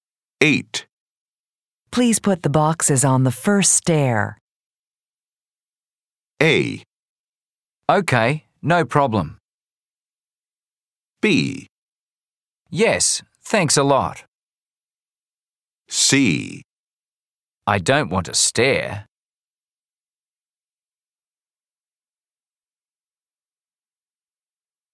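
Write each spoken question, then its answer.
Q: Please put the boxes on the first stair.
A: A: Okay, no problem.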